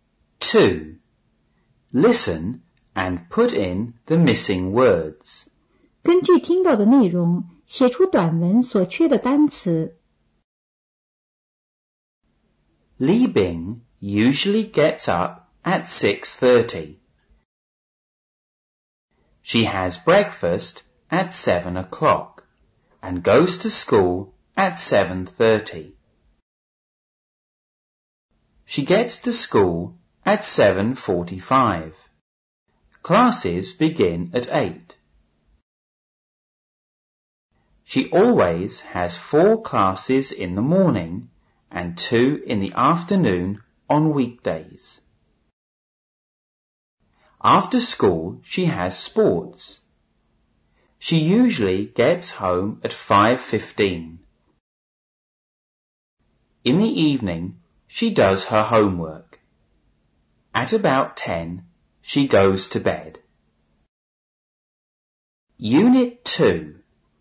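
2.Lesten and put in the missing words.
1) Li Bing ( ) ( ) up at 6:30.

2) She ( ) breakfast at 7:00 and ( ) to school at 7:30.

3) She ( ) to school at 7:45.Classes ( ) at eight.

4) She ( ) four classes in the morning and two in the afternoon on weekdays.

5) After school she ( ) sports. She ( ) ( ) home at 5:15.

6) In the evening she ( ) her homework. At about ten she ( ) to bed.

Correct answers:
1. usually gets
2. has; goes
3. gets; begin
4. always has
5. has; usually gets
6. does; goes

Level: 五年级上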